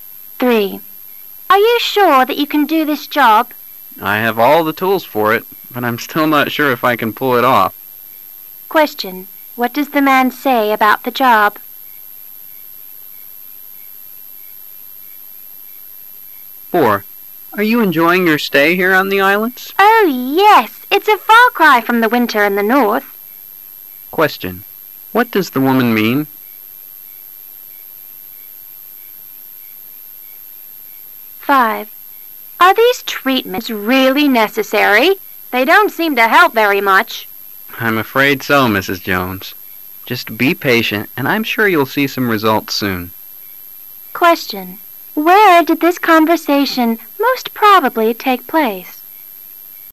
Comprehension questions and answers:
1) What does the woman mean?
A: The islands are very different from the North.